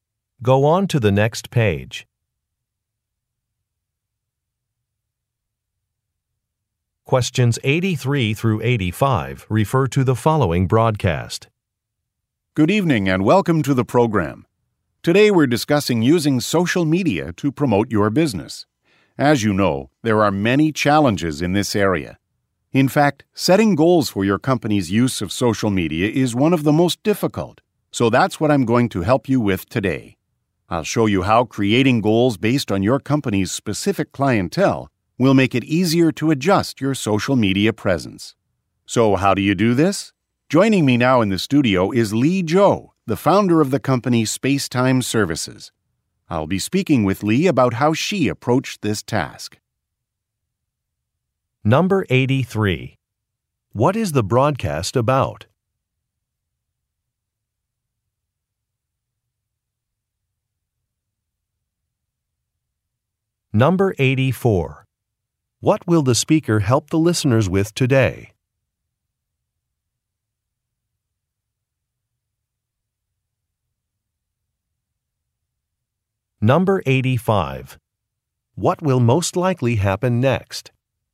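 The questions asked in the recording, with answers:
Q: What is the broadcast about?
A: Using social media to promote a business

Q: What will the speaker help the listeners with today?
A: Setting goals for their company's use of social media

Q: What will most likely happen next?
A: The speaker will interview Lee Zhou, a company founder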